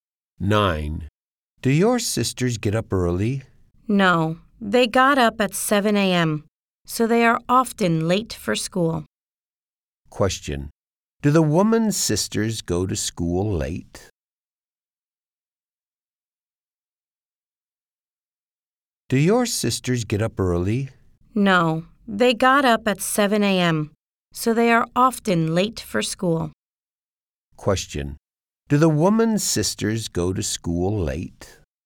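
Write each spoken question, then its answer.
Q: Do the woman's sisters go to school late?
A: Yes, they are often late.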